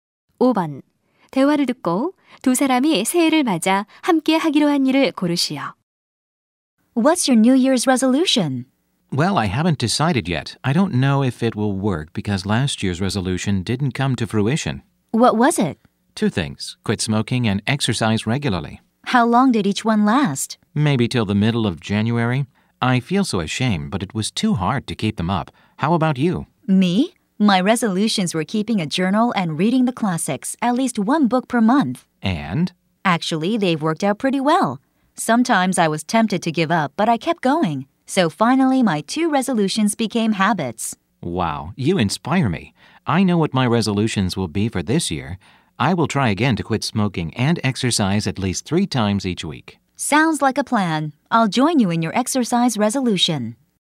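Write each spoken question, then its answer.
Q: 대화를 듣고 두 사람이 새해를 맞아 함께 하기로 한 일을 고르시오.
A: 운동하기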